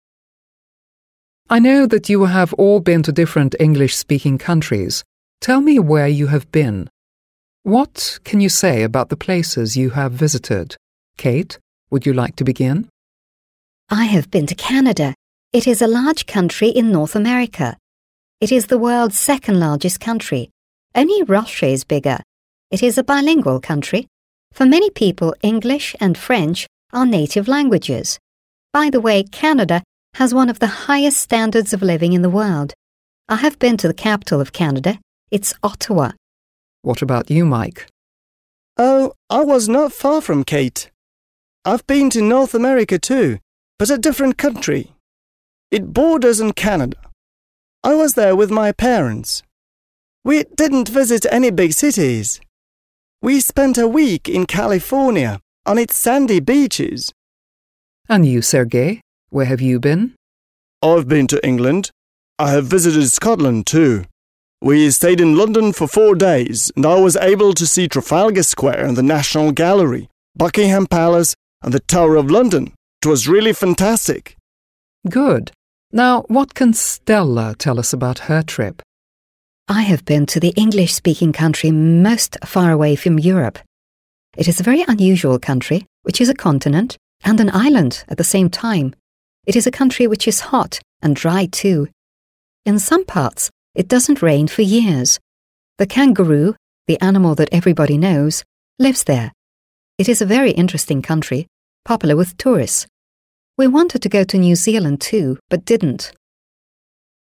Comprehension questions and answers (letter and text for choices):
Listen and match the names of the speakers (1—4) with the statements they make (a—e). There is one statement you don't have to use.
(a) The speaker talks about New Zealand.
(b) The speaker says he/she has visited a coast of North America.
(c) The speaker talks about Australia.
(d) The speaker says there are two mother tongues in the country he/she has visited.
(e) The speaker talks about the places of interest in a big city.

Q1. Kate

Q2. Mike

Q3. Sergei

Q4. Stella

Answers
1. (d) The speaker says there are two mother tongues in the country he/she has visited.
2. (b) The speaker says he/she has visited a coast of North America.
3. (e) The speaker talks about the places of interest in a big city.
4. (c) The speaker talks about Australia.

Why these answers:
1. Kate says about Canada: «It is a bilingual country. For many people, English and French are native languages.» (Это двуязычная страна. Для многих людей английский и французский — родные языки).
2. Mike mentions: «We spent a week in California on its sandy beaches.» (Мы провели неделю в Калифорнии на её песчаных пляжах). Калифорния находится на побережье.
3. Sergei lists landmarks in London: «Trafalgar Square, the National Gallery, Buckingham Palace...» (Трафальгарская площадь, Национальная галерея, Букингемский дворец...).
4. Stella describes: «It is a very unusual country which is a continent and an island... The kangaroo... lives there.» (Это очень необычная страна, которая является континентом и островом... Там живет кенгуру).

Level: 7 класс